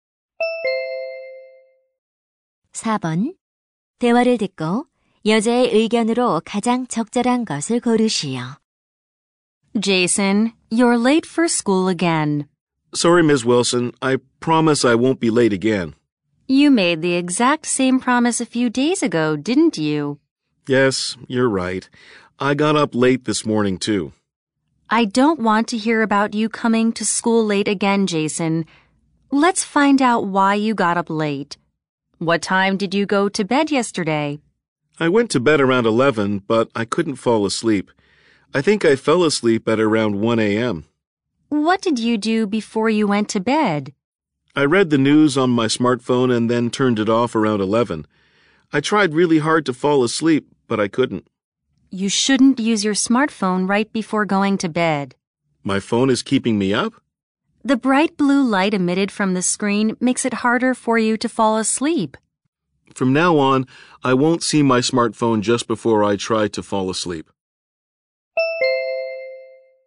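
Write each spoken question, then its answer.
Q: 대화를 듣고 여자의 의견으로 가장 적절한 것을 고르시오.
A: 잠자기 직전에 스마트폰을 사용하면 안 된다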